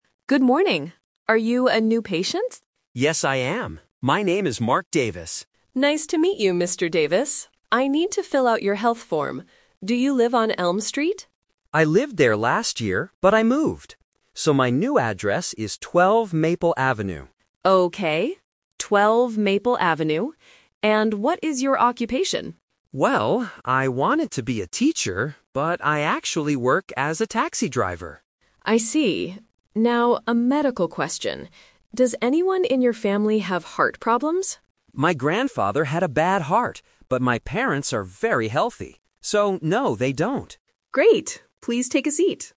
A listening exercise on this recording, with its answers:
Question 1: Where does Mark live now?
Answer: On Maple Avenue.

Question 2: What is Mark's occupation?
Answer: A taxi driver.

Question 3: Who in Mark's family had heart problems?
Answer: His grandfather.

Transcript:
Receptionist: Good morning. Are you a new patient?
Mark: Yes, I am. My name is Mark Davis.
Receptionist: Nice to meet you, Mr. Davis. I need to fill out your health form. Do you live on Elm Street?
Mark: I lived there last year, but I moved. So, my new address is 12 Maple Avenue.
Receptionist: Okay, 12 Maple Avenue. And what is your occupation?
Mark: Well, I wanted to be a teacher, but I actually work as a taxi driver.
Receptionist: I see. Now, a medical question. Does anyone in your family have heart problems?
Mark: My grandfather had a bad heart, but my parents are very healthy. So, no, they don't.